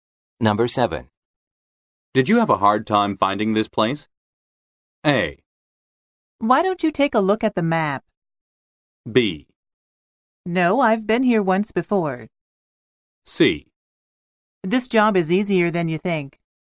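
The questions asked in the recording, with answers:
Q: Did you have a hard time finding this place?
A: B: No, I've been here once before.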